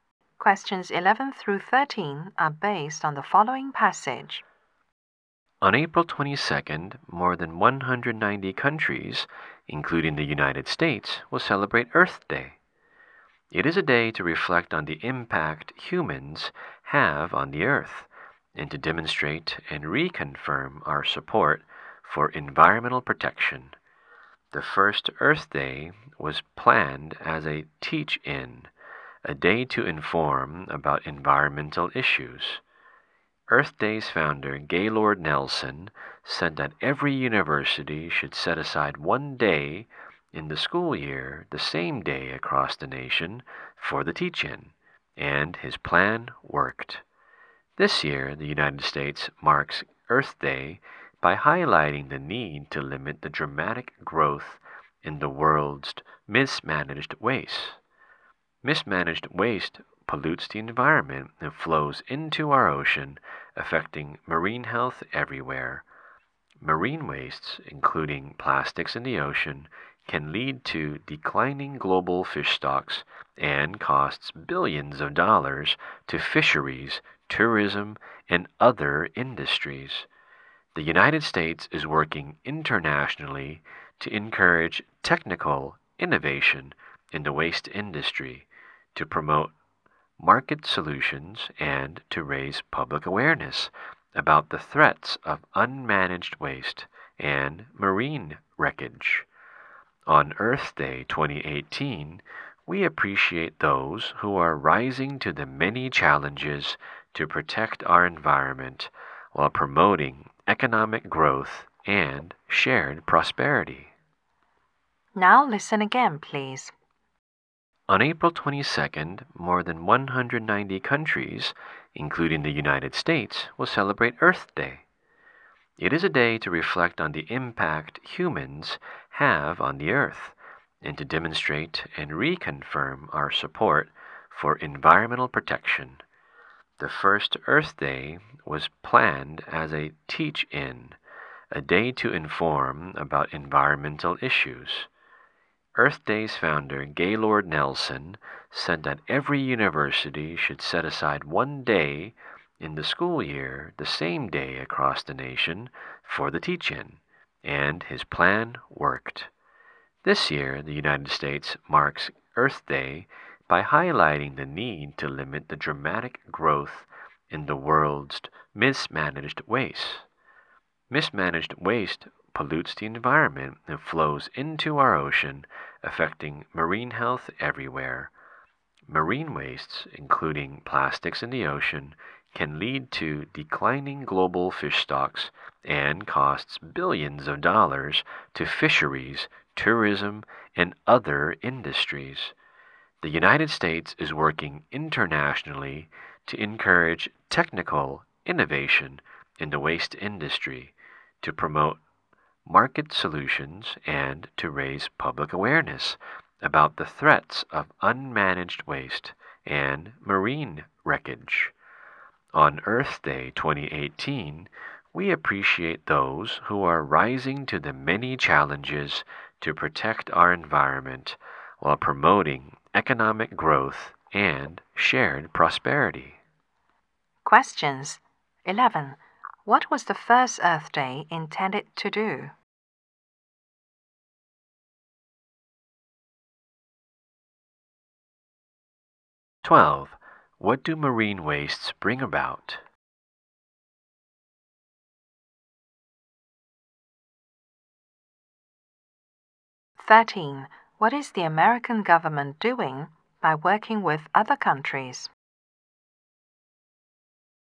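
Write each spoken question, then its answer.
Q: What was the first Earth Day intended to do?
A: To inform people about environmental issues

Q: What do marine wastes bring about?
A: Declining global fish stocks and losses of billions of dollars

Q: What is the American government doing by working with other countries?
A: Encouraging innovation in the waste industry, promoting market solutions and raising public awareness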